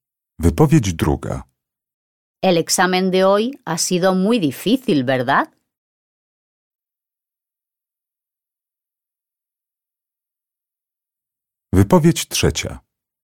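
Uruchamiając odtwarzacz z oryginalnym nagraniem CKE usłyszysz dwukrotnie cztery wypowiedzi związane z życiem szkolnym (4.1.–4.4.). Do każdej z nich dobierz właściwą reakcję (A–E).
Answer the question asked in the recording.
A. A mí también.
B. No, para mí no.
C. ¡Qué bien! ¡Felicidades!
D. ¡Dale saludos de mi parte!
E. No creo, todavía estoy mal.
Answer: B. No, para mí no.

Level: egzamin ósmoklasisty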